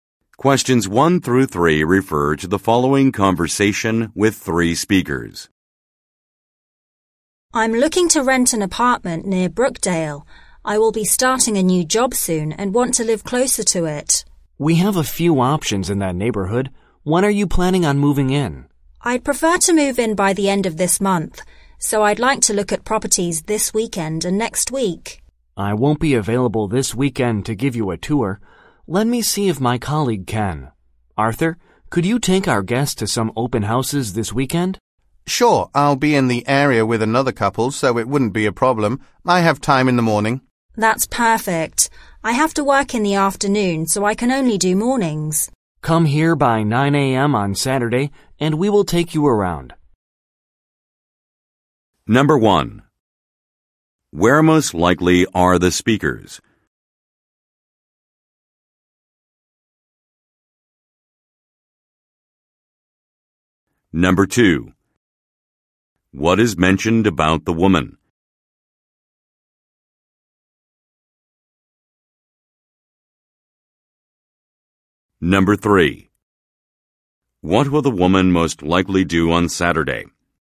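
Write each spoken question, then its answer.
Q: Where most likely are the speakers?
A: At a real estate agency

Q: What is mentioned about the woman?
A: She will be starting a new job soon

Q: What will the woman most likely do on Saturday?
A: Tour open houses with Arthur in the morning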